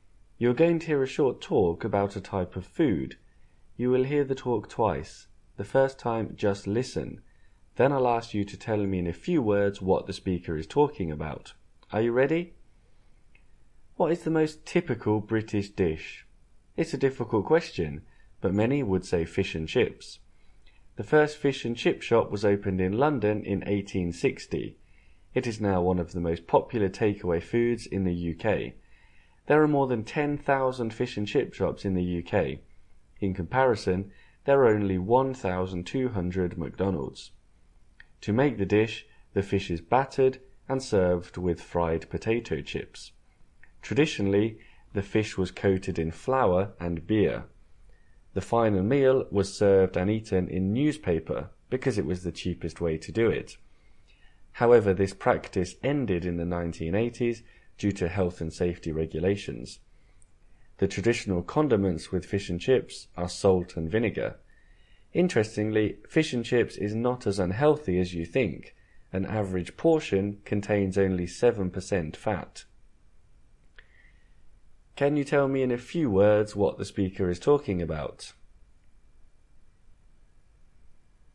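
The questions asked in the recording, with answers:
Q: Can you tell me in a few words what the speaker is talking about?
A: Fish and chips, a typical British dish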